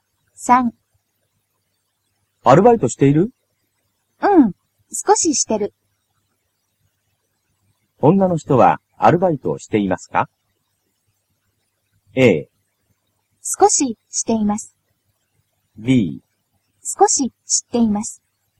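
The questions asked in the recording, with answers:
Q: 女の人はアルバイトをしていますか?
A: A: 少ししています。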